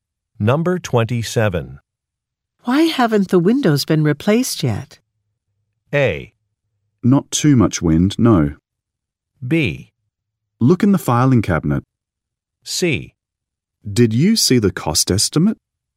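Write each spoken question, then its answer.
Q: Why haven't the windows been replaced yet?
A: C: Did you see the cost estimate?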